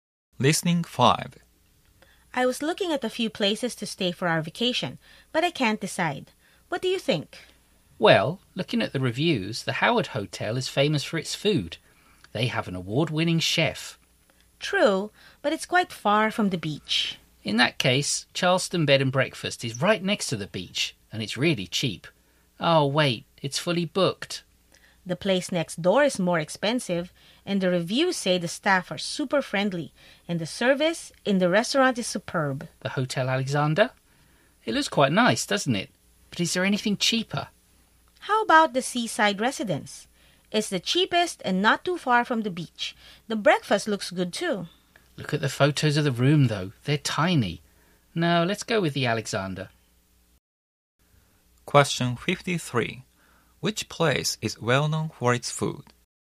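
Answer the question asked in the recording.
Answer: The Howard Hotel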